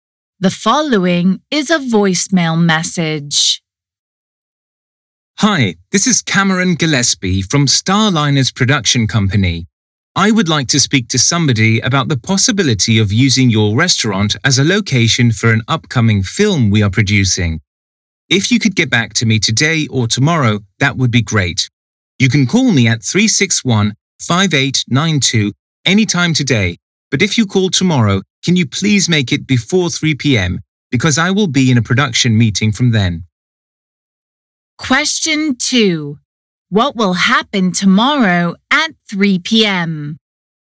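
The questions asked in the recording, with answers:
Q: What will happen tomorrow at 3 p.m.?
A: Cameron will be in a production meeting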